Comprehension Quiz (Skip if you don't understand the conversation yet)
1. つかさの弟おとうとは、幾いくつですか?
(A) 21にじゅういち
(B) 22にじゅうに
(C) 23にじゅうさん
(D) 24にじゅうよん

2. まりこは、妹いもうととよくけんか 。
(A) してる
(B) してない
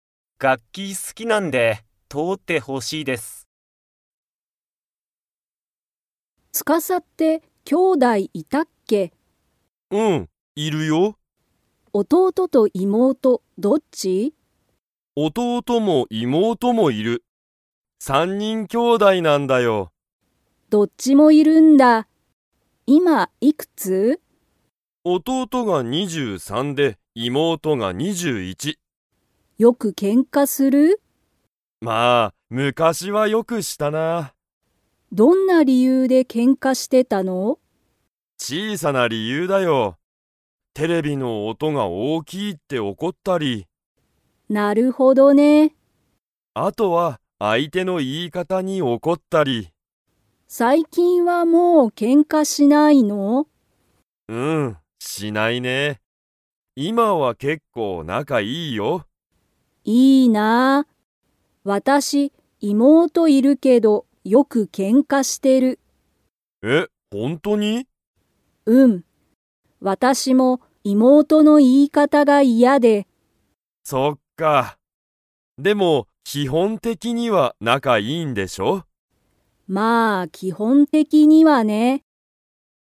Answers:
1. 23にじゅうさん
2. してる

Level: Level 4

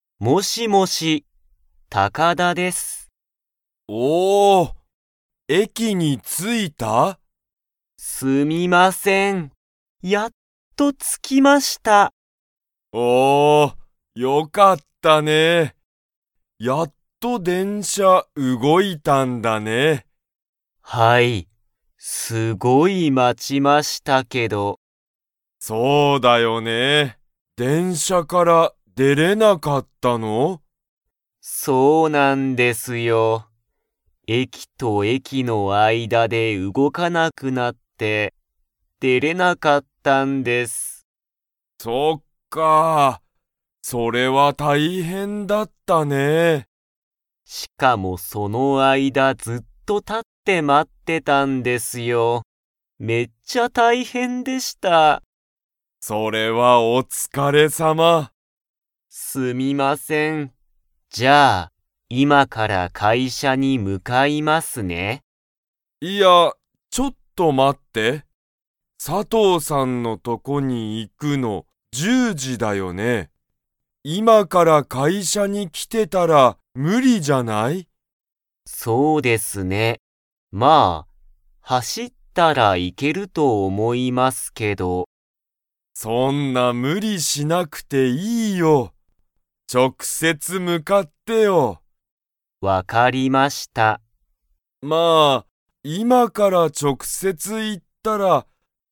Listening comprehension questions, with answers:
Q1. 高田たかださんは、どこに着つきましたか?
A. 会社かいしゃ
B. 佐藤さとうさんのとこ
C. 電車でんしゃ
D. 駅えき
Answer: 駅えき

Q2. 高木たかぎさんは、佐藤さとうさんのとこに直接ちょくせつ 。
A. 向むかう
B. 向むかわない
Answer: 向むかう

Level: Level 3

